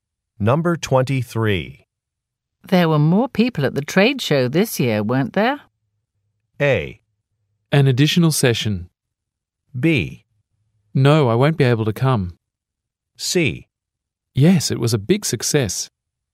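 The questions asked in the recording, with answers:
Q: There were more people at the trade show this year, weren't there?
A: C: Yes, it was a big success.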